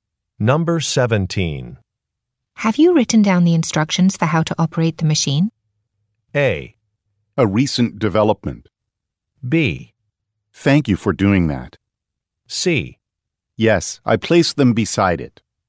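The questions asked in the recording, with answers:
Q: Have you written down the instructions for how to operate the machine?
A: C: Yes, I placed them beside it.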